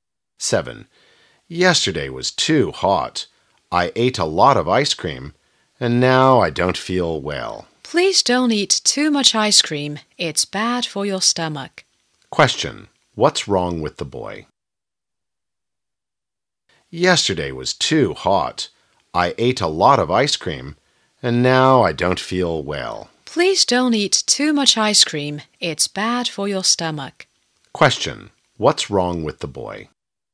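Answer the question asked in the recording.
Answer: He has a stomachache from eating too much ice cream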